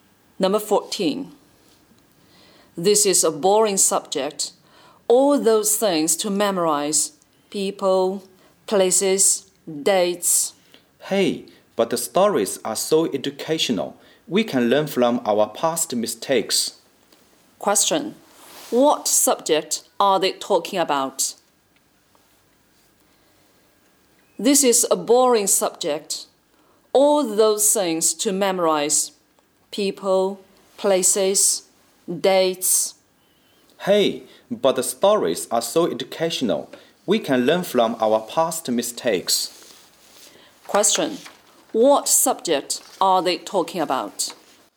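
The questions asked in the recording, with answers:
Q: What subject are they talking about?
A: History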